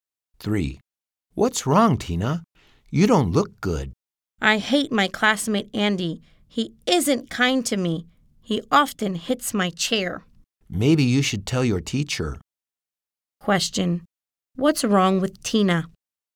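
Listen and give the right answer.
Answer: Her classmate Andy isn't kind to her; he often hits her chair.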